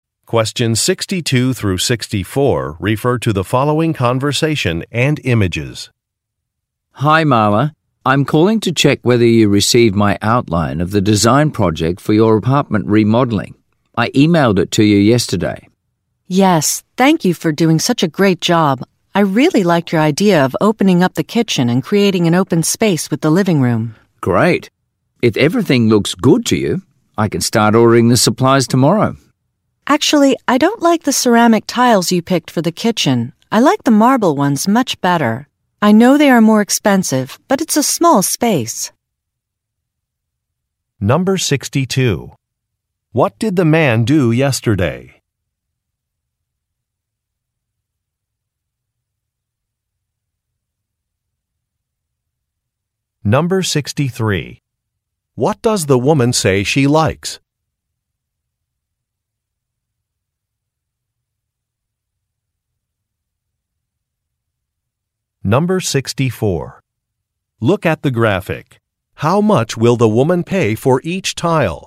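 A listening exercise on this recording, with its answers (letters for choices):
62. What did the man do yesterday?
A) He visited a property.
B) He contacted a supplier.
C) He sent a plan.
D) He took some measurements.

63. What does the woman say she likes?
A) The cost the man has estimated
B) The open-space design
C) The colors the man has selected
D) The remodeling timeline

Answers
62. C
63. B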